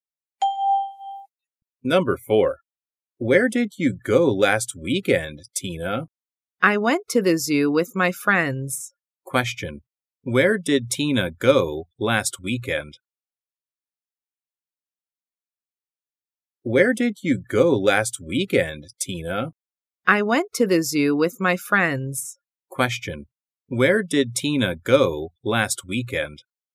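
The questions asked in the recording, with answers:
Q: Where did Tina go last weekend?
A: To the zoo.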